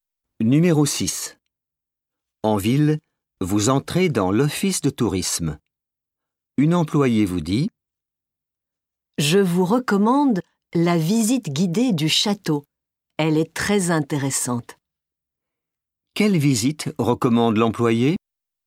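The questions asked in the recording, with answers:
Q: Quelle visite recommande l'employée?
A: La visite guidée du château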